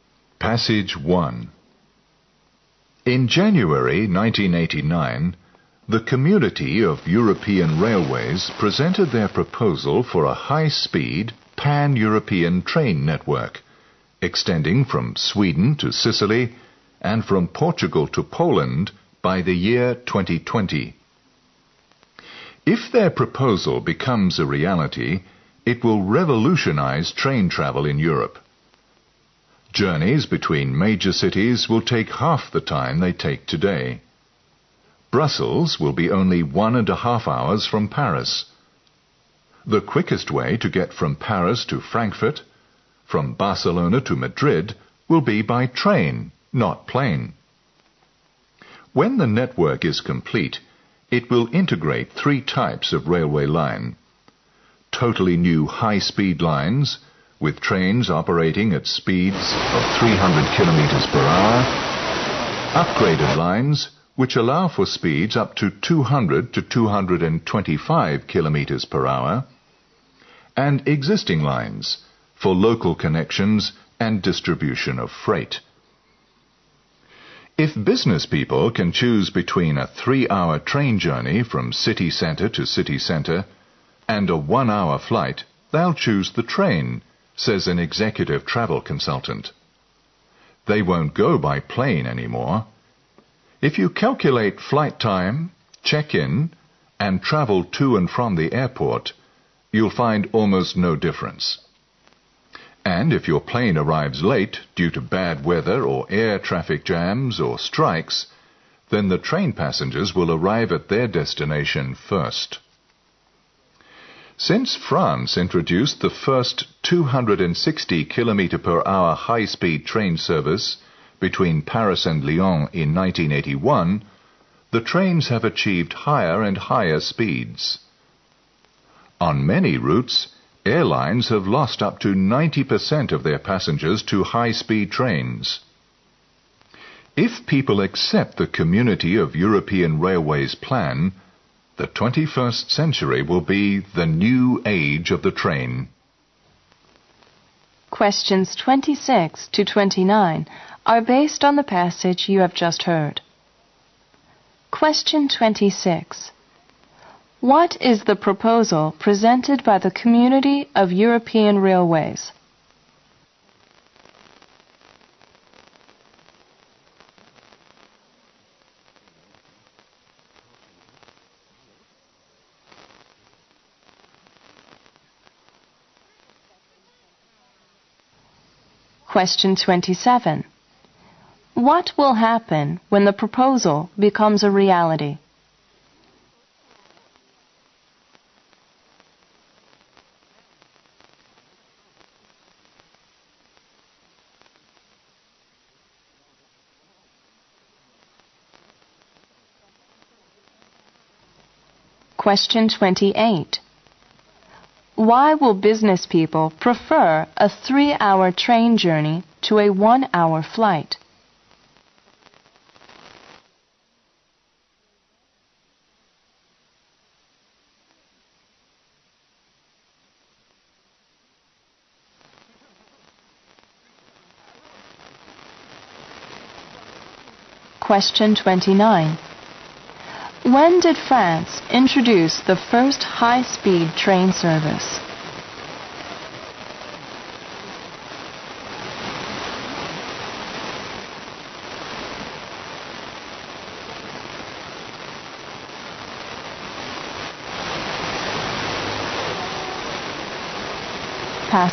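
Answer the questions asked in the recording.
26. A high-speed pan-European train network
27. Journeys between major cities will take half the time
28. Counting check-in and airport travel, the total time is almost the same
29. In 1981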